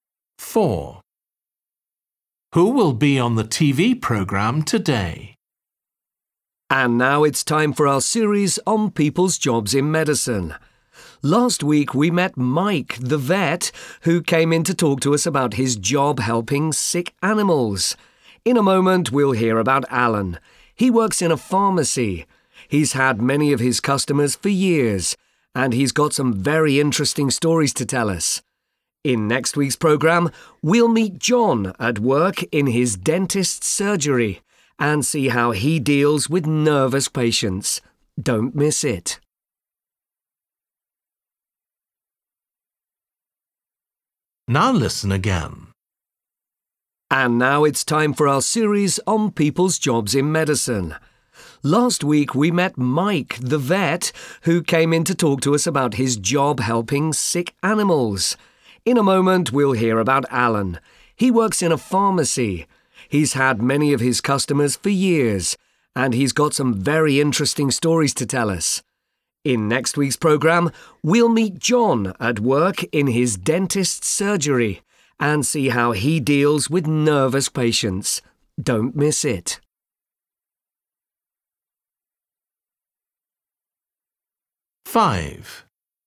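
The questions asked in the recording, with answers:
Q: Who will be on the TV programme today?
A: Alan, who works in a pharmacy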